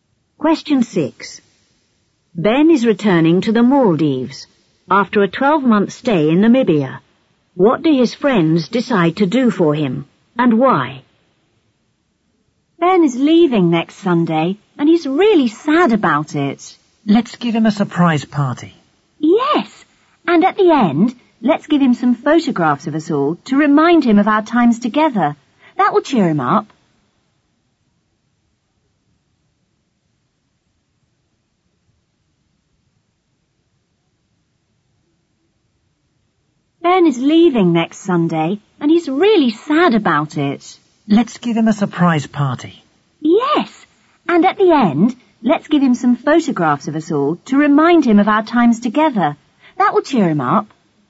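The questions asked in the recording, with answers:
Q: What do his friends decide to do for him, and why?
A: Give him a surprise party and photographs, to cheer him up and remind him of their times together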